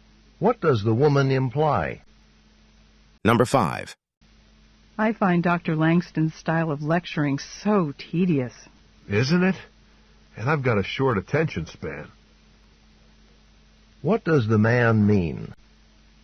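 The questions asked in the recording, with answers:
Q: What does the man mean?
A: He also finds Dr. Langston's lectures boring.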